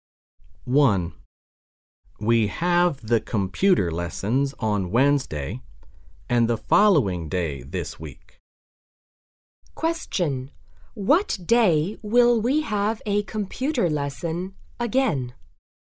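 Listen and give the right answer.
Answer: Thursday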